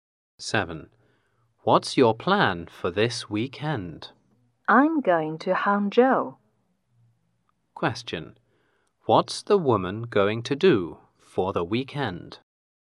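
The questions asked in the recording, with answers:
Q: What's the woman going to do for the weekend?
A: Go to Hangzhou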